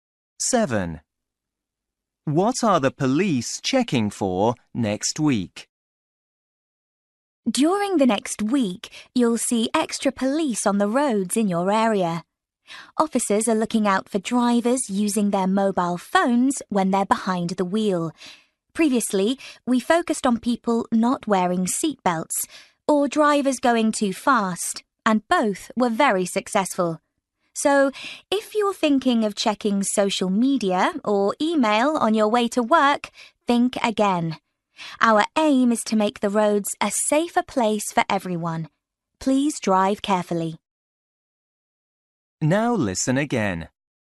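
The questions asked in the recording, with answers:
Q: What are the police checking for next week?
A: Drivers using their mobile phones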